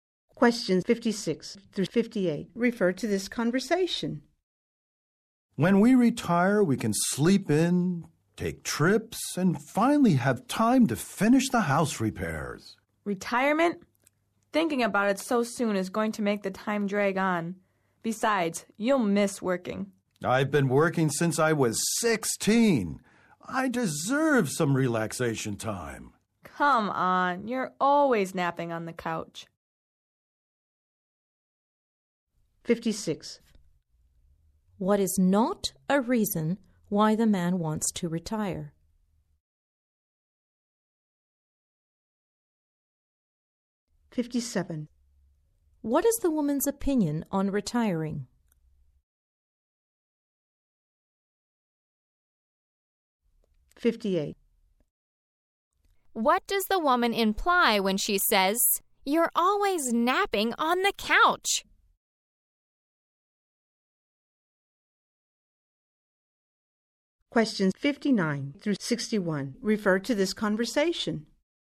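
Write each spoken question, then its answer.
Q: What is the woman's opinion on retiring?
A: Thinking about it so soon will make time drag; he'll miss working

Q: What does the woman imply when she says, "You're always napping on the couch"?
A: He already gets plenty of relaxation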